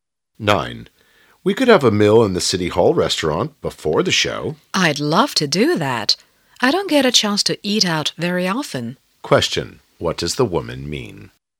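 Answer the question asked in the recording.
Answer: She would love to eat at the restaurant; she seldom eats out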